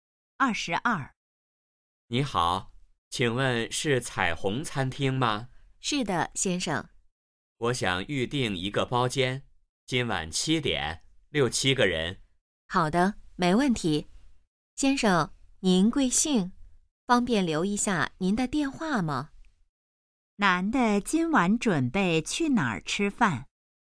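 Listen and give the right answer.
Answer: 彩虹餐厅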